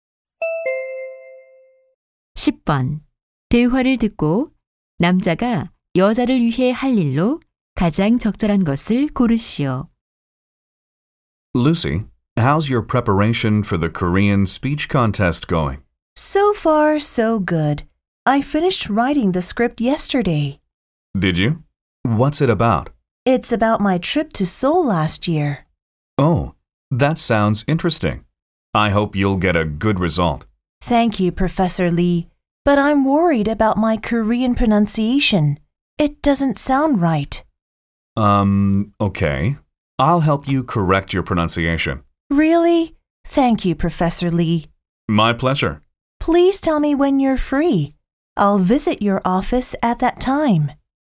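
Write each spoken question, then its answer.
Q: 대화를 듣고 남자가 여자를 위해 할 일로 가장 적절한 것을 고르시오.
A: 한국어 발음 교정 도와주기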